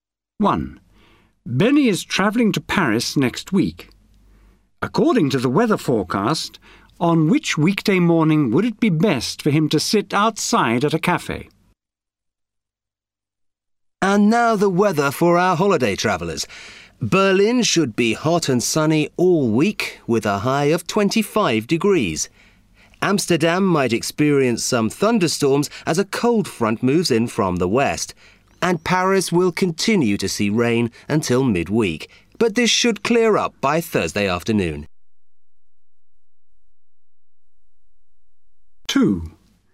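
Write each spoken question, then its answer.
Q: According to the weather forecast, on which weekday morning would it be best for him to sit outside at a cafe?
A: Friday morning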